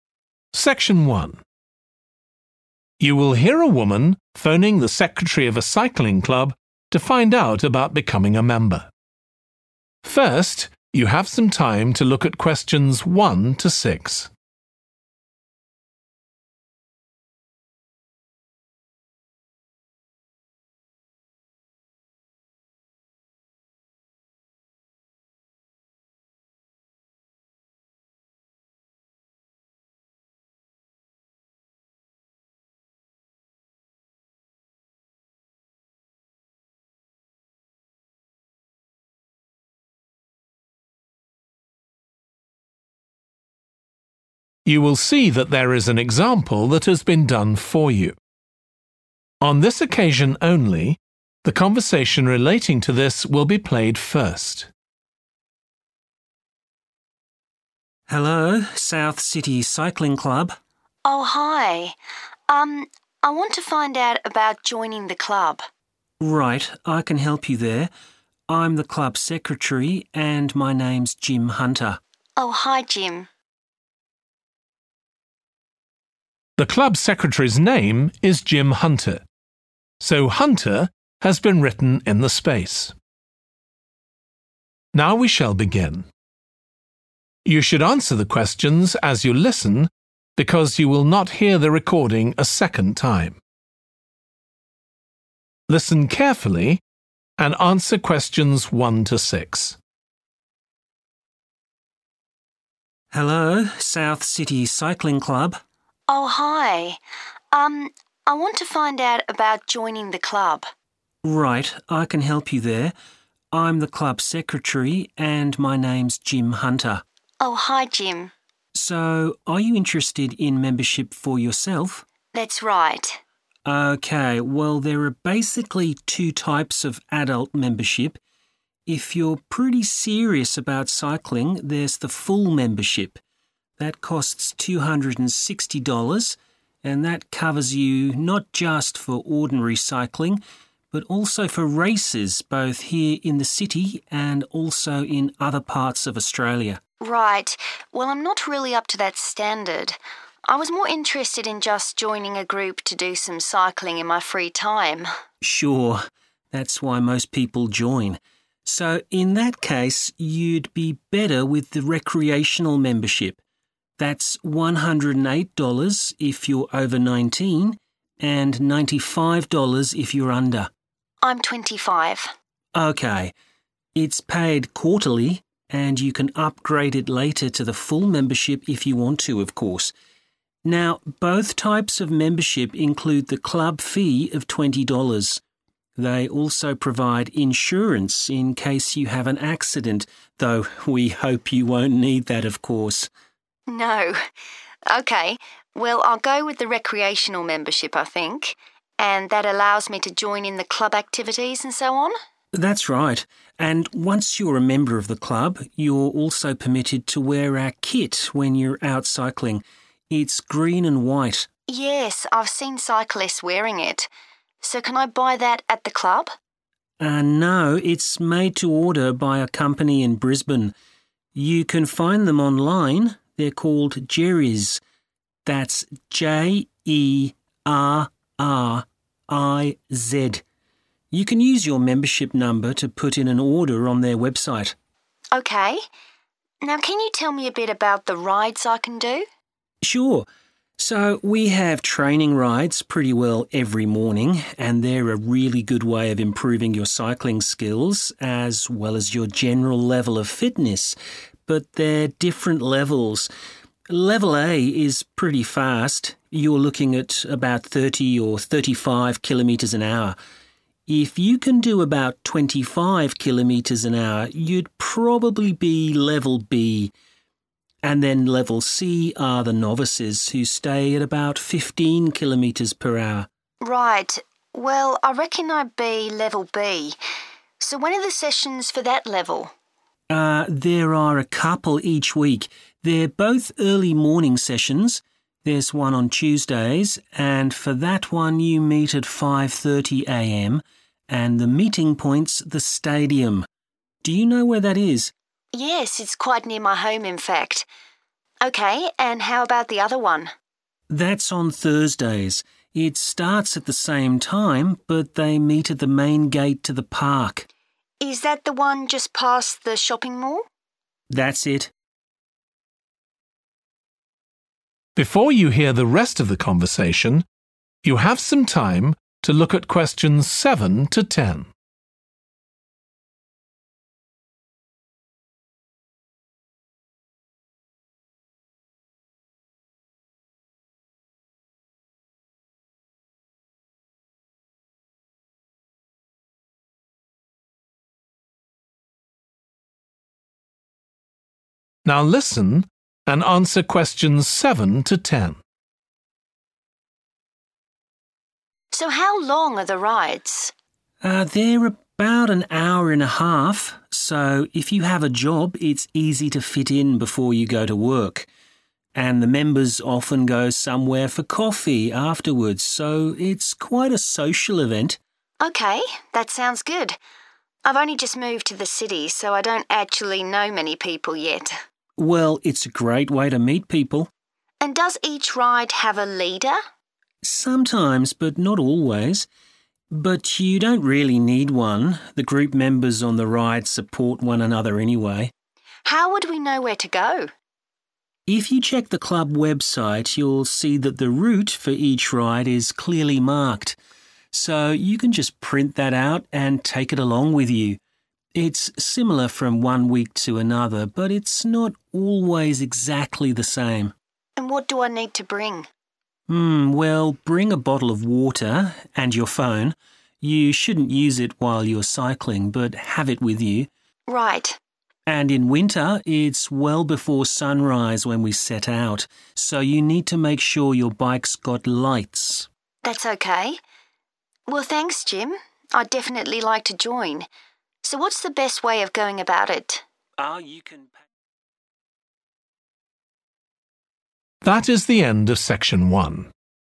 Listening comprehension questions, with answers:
Complete the notes below. Write ONE WORD AND/OR A NUMBER for each answer.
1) Full membership costs $260; this covers cycling and _____ all over Australia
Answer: races

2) Cost of membership includes the club fee and _____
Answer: insurance

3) The club kit is made by a company called _____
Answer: Jerriz

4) Level B: speed about _____ kph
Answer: 25 / twenty-five

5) – Tuesdays at 5.30 am, meet at the _____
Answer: stadium

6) – Thursdays at 5.30 am, meet at the entrance to the _____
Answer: park

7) Members often have _____ together afterwards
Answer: coffee

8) There is not always a _____ with the group on these rides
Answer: leader

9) Check and print the _____ on the website beforehand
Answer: route

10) Bikes must have _____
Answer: lights

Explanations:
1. The correct answer 'races' is right because the excerpt tells us that membership covers races, not just regular cycling. So, 'races' is the right word to describe what is covered by the membership.
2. The correct answer is 'insurance' because the excerpt explains that both memberships include protection, which is called 'insurance', in case of an accident.
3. The correct answer is 'Jerriz' because it matches the name of the company mentioned in the excerpt where it says, 'You can find them online: they're called Jerriz.' This indicates that Jerriz is the company responsible for making the club kit.
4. The correct answer is 25 because the excerpt explicitly states that if someone can cycle at about 25 kilometres per hour, they would be at level B.
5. The correct answer 'stadium' is correct because the excerpt says that the Tuesday training ride meeting point is the "stadium".
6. The correct answer matches the location described in the excerpt, confirming that on Thursdays, the meeting point for the cycling club's training ride is at the park's main gate.
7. The correct answer is 'coffee' because the transcript clearly mentions that members go somewhere for coffee after their rides, indicating that it is a common activity for them.
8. The correct answer matches the information provided in the notes where it is mentioned that there is not always a leader with the group on these rides. Therefore, the answer 'leader' is correct as it indicates the absence of a consistent leader for every ride.
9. The correct answer is 'route' because it directly relates to the direction or path that the cyclists take during their rides. The excerpt confirms this connection by mentioning that the route information can be printed from the club's website.
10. The correct answer is 'lights' because the excerpt mentions the importance of having lights on one's bike for safety during rides, especially when it is dark.

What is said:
JIM: Hello, South City Cycling Club.
WOMAN: Oh, hi. Er ... I want to find out about joining the club.
JIM: Right. I can help you there. I'm the club secretary and my name's Jim Hunter.
WOMAN: Oh, hi Jim.
JIM: So, are you interested in membership for yourself?
WOMAN: That's right.
JIM: OK. Well there are basically two types of adult membership. If you're pretty serious about cycling, there's the Full membership. That costs 260 dollars and that covers you not just for ordinary cycling but also for races both here in the city and also in other parts of Australia.
WOMAN: Right. Well, I'm not really up to that standard. I was more interested in just joining a group to do some cycling in my free time.
JIM: Sure. That's why most people join. So, in that case you'd be better with the Recreational membership. That's 108 dollars if you're over 19, and 95 dollars if you're under.
WOMAN: I'm 25.
JIM: OK. It's paid quarterly, and you can upgrade it later to the Full membership if you want to, of course. Now both types of membership include the club fee of 20 dollars. They also provide insurance in case you have an accident, though we hope you won't need that, of course.
WOMAN: No. OK, well, I'll go with the Recreational membership, I think. And that allows me to join in the club activities, and so on?
JIM: That's right. And once you're a member of the club, you're also permitted to wear our kit when you're out cycling. It's green and white.
WOMAN: Yes, I've seen cyclists wearing it. So, can I buy that at the club?
JIM: No, it's made to order by a company in Brisbane. You can find them online: they're called Jerriz. That's J-E-R-R-I-Z. You can use your membership number to put in an order on their website.
WOMAN: OK. Now, can you tell me a bit about the rides I can do?
JIM: Sure. So we have training rides pretty well every morning, and they're a really good way of improving your cycling skills as well as your general level of fitness, but they're different levels. Level A is pretty fast – you're looking at about 30 or 35 kilometres an hour. If you can do about 25 kilometres an hour, you'd probably be level B, and then level C are the novices, who stay at about 15 kilometres per hour.
WOMAN: Right. Well I reckon I'd be level B. So, when are the sessions for that level?
JIM: There are a couple each week. They're both early morning sessions. There's one on Tuesdays, and for that one you meet at 5.30 am, and the meeting point's the stadium – do you know where that is?
WOMAN: Yes, it's quite near my home, in fact. OK, and how about the other one?
JIM: That's on Thursdays. It starts at the same time, but they meet at the main gate to the park.
WOMAN: Is that the one just past the shopping mall?
JIM: That's it.
WOMAN: So how long are the rides?
JIM: They're about an hour and a half. So, if you have a job it's easy to fit in before you go to work. And the members often go somewhere for coffee afterwards, so it's quite a social event.
WOMAN: OK. That sounds good. I've only just moved to the city so I don't actually know many people yet.
JIM: Well, it's a great way to meet people.
WOMAN: And does each ride have a leader?
JIM: Sometimes, but not always. But you don't really need one; the group members on the ride support one another, anyway.
WOMAN: How would we know where to go?
JIM: If you check the club website, you'll see that the route for each ride is clearly marked. So you can just print that out and take it along with you. It's similar from one week to another, but it's not always exactly the same.
WOMAN: And what do I need to bring?
JIM: Well, bring a bottle of water, and your phone. You shouldn't use if while you're cycling, buy have it with you.
WOMAN: Right.
JIM: And in winter, it's well before sunrise when we set out, so you need to make sure your bike's got lights.
WOMAN: That's OK. Well, thanks Jim. I'd definitely like to join. So what's the best way of going about it?
JIM: You can ...